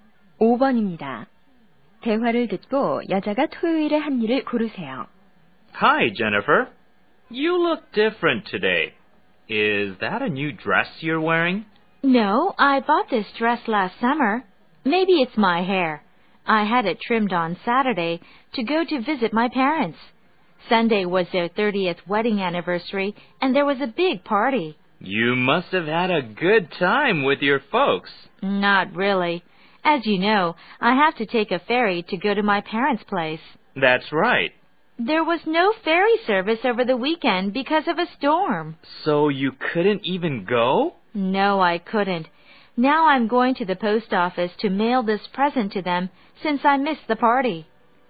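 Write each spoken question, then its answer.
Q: 대화를 듣고 여자가 토요일에 한 일을 고르세요.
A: 머리 다듬기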